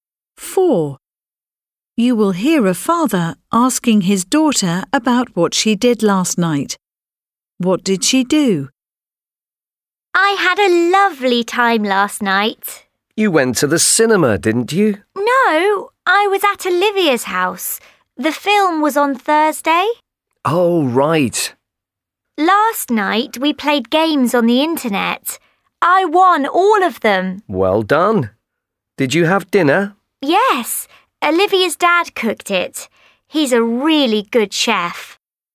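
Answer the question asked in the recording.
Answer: She played games on the internet at Olivia's house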